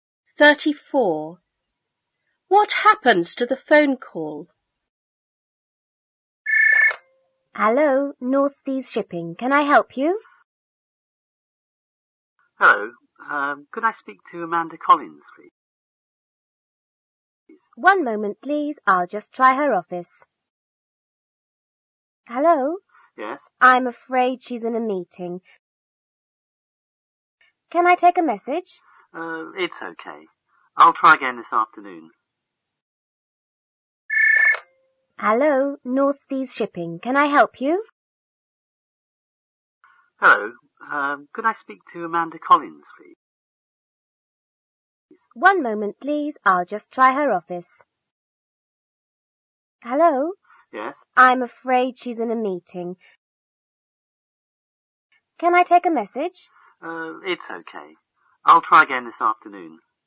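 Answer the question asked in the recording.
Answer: Amanda is in a meeting, so the caller will try again in the afternoon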